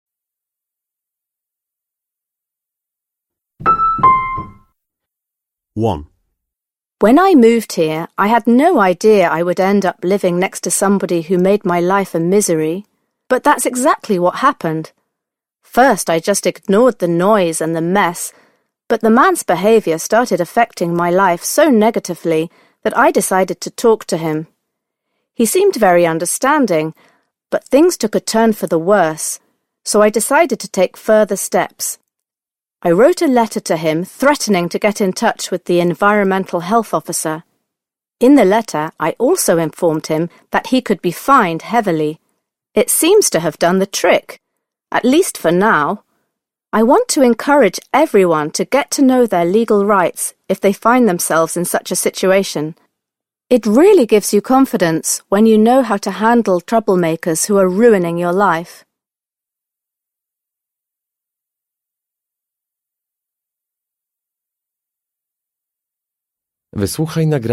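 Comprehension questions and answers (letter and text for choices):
Przesłuchaj dwukrotnie tekst. Z podanych odpowiedzi wybierz właściwą, zgodną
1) The woman recounts her experience in order to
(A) demand heavier fines for people who engage in antisocial behaviour.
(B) suggest what action could be taken in response to antisocial behaviour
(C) complain about the lack of authorities' reaction to antisocial behaviour.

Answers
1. (B) suggest what action could be taken in response to antisocial behaviour

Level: matura rozszerzona 2022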